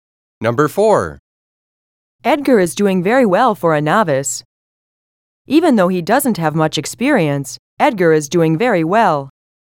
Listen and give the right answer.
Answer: Same is the correct answer.